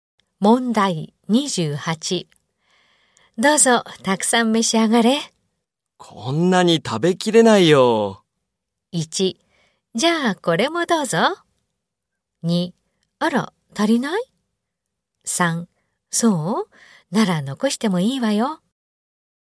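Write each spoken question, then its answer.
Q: どうぞ、たくさん召し上がれ。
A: 3: そう?なら残してもいいわよ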